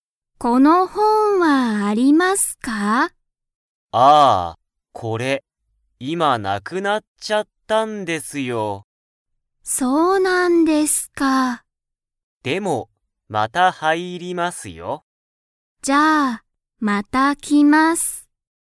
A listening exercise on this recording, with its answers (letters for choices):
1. 田中(たなか)さんは、また来(き)ますか?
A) はい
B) いいえ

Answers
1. A